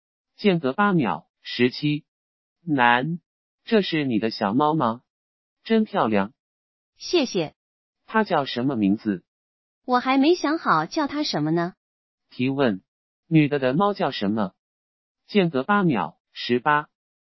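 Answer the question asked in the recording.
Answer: 还没有名字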